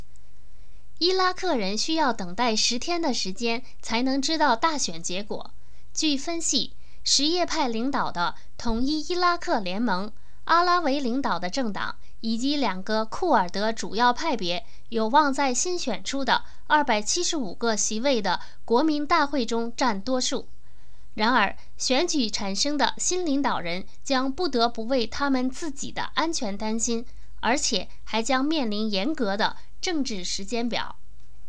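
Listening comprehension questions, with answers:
Please answer the following questions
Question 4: 新选出的国民大会有多少席位?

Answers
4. 275个

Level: 3rd Year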